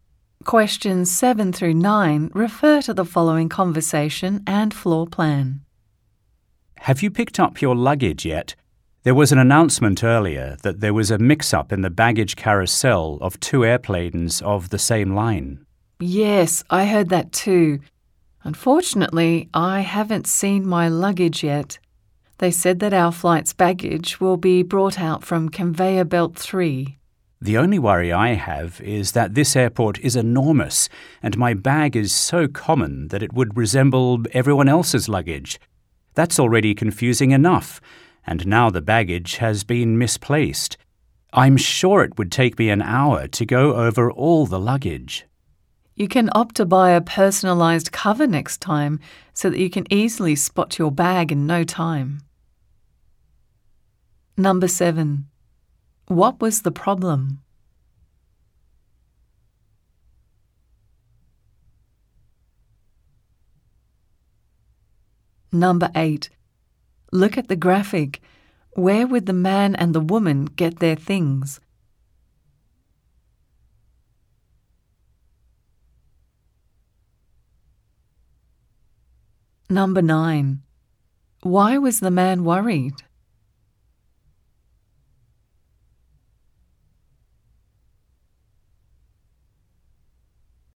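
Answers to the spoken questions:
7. Baggage from two airplanes was mixed up at the carousel
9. His bag looks like everyone else's, and the airport is huge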